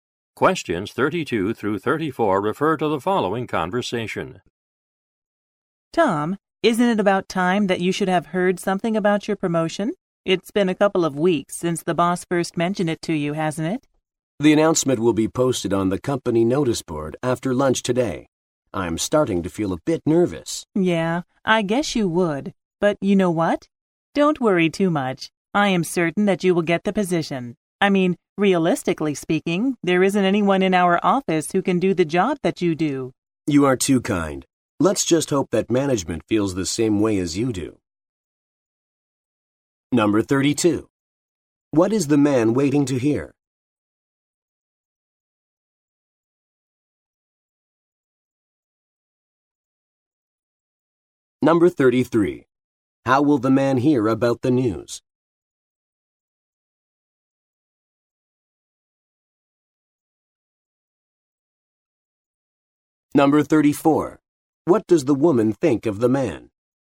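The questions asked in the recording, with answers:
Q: What is the man waiting to hear?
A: News about his promotion

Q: How will the man hear about the news?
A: From an announcement on the company notice board

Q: What does the woman think of the man?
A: He is very capable; nobody else can do his job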